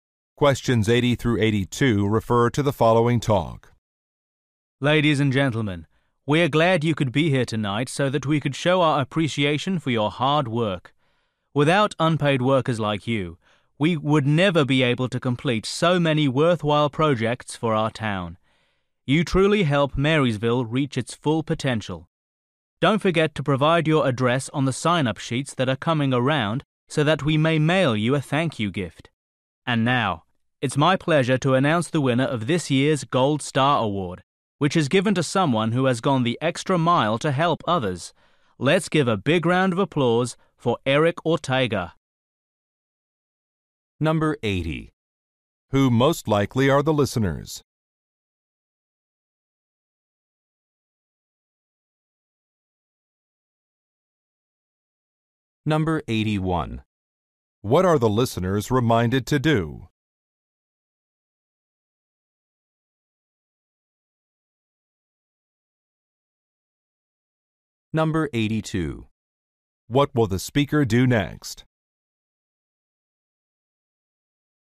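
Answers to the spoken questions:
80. Volunteers
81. Write their address on the sign-up sheets
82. Present the Gold Star Award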